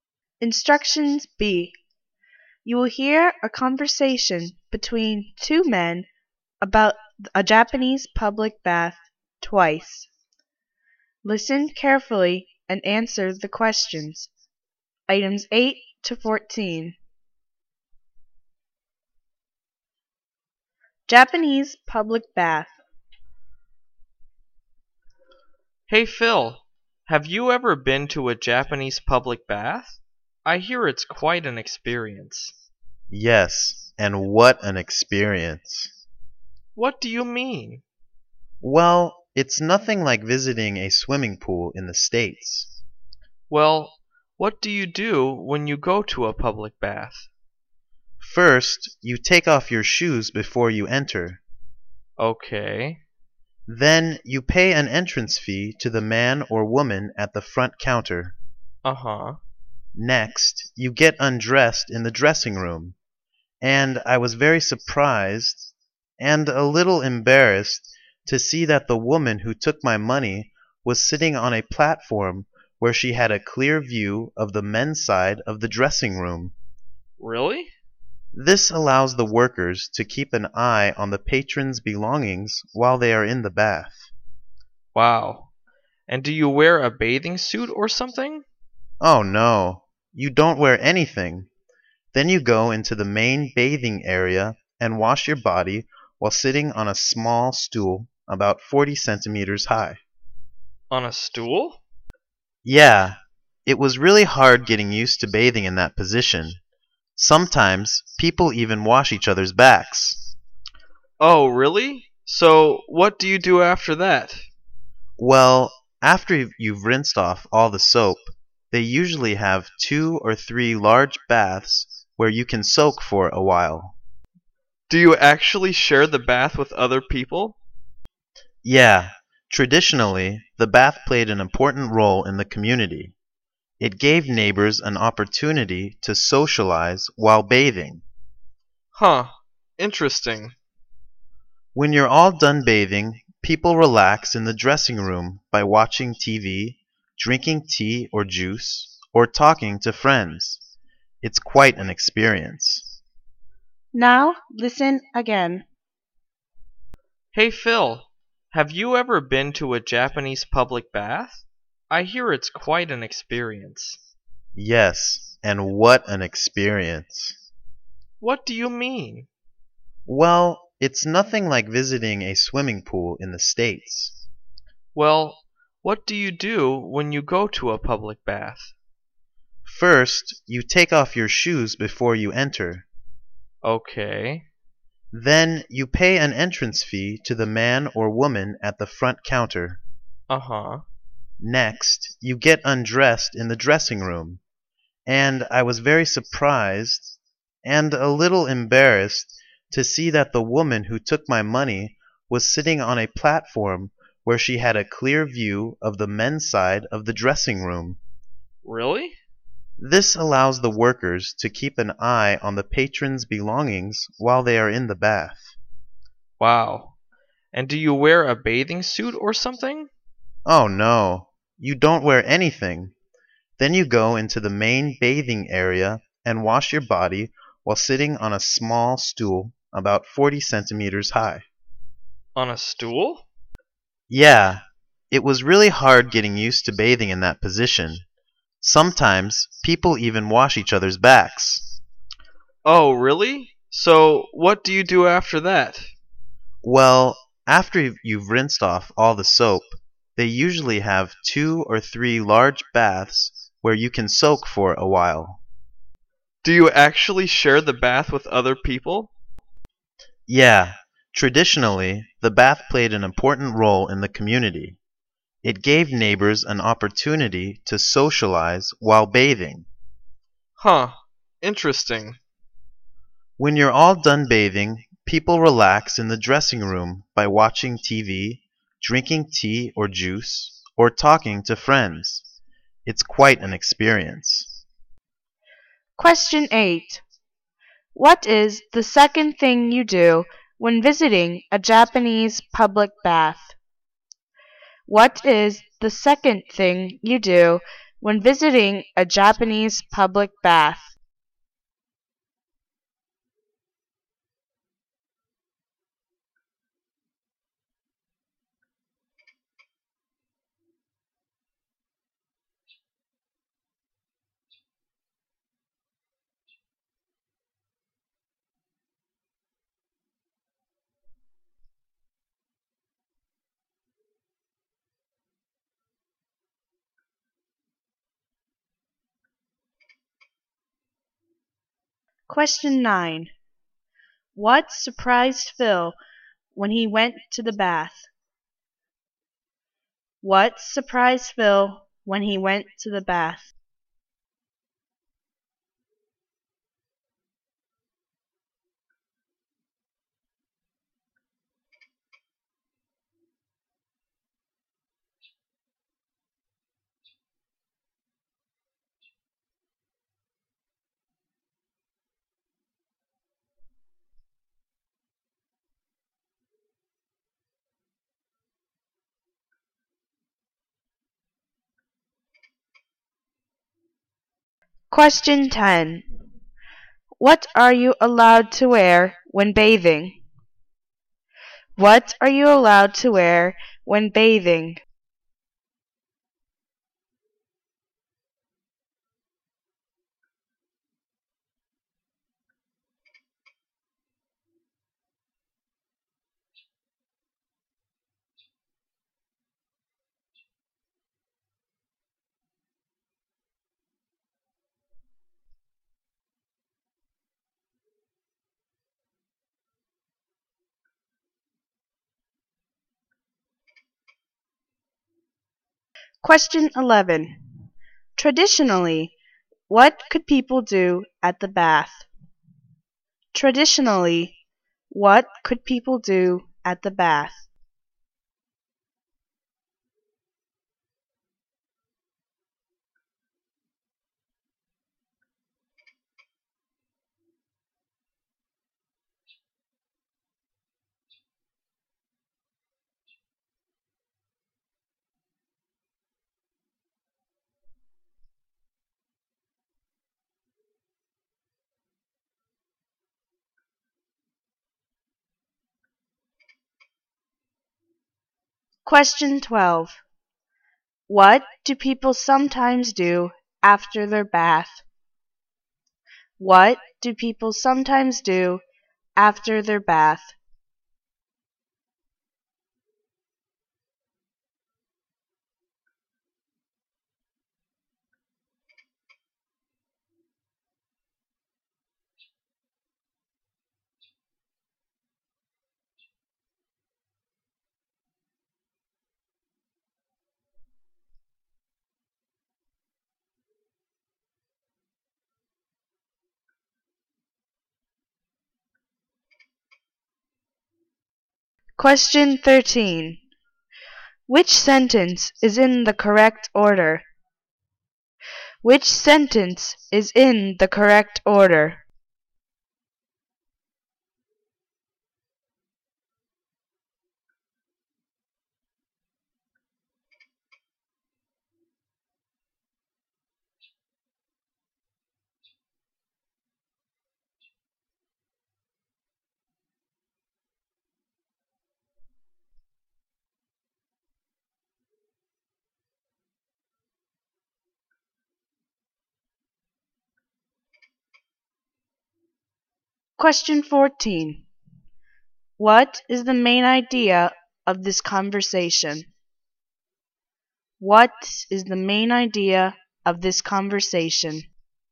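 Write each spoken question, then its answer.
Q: What is the second thing you do when visiting a Japanese public bath?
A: Pay an entrance fee at the front counter

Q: What surprised Phil when he went to the bath?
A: The woman who took his money could see the men's dressing room

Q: What are you allowed to wear when bathing?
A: Nothing

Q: Traditionally, what could people do at the bath?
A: Socialize with neighbors

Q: What do people sometimes do after their bath?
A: Relax in the dressing room, watching TV, drinking tea or juice, or talking to friends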